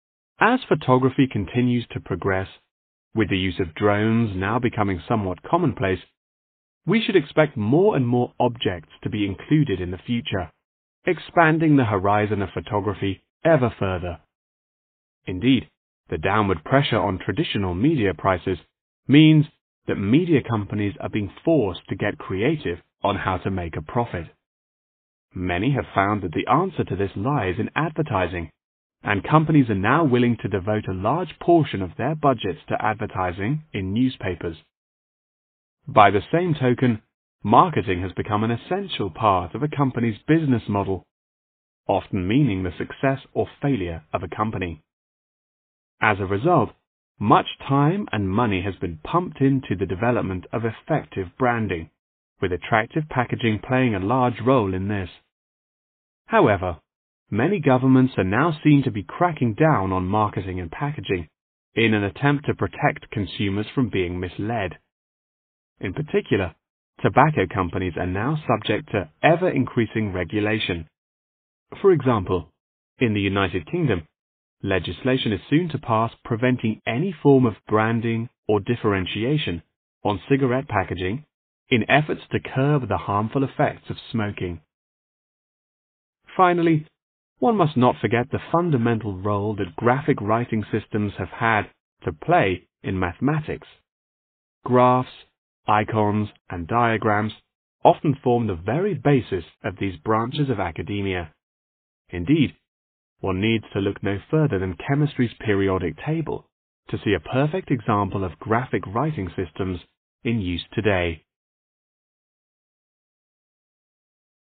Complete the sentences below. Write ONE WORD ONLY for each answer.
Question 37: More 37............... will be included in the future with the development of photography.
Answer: objects

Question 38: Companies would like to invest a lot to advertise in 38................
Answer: newspapers

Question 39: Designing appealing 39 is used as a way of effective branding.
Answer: packaging

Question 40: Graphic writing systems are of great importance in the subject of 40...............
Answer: mathematics/ math/ maths